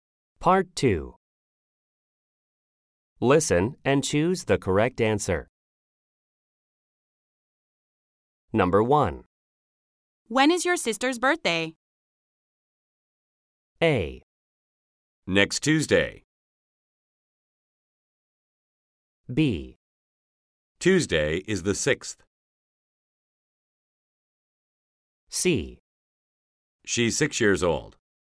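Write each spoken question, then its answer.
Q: When is your sister's birthday?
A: A: Next Tuesday.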